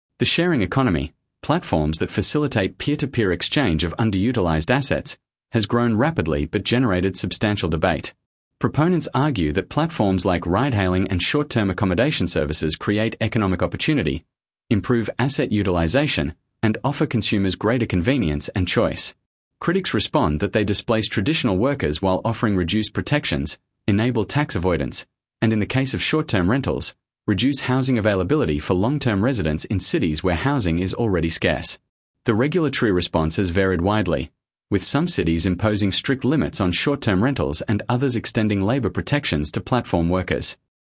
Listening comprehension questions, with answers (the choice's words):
Task reminder: Read all options before the audio starts. Select the paragraph that best summarises the recording. The correct answer matches the main idea and tone, not just one detail.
Sample Text 1 — The Sharing Economy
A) Platforms like Airbnb and Uber have made cities more affordable by increasing the supply of accommodation and transport.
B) The sharing economy creates income opportunities and efficiency gains but raises serious concerns about workers' rights and housing availability.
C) Sharing economy platforms are failing financially because they cannot compete with established hotel and taxi industries.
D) The sharing economy has no significant effect on urban housing markets.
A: The sharing economy creates income opportunities and efficiency gains but raises serious concerns about workers' rights and housing availability.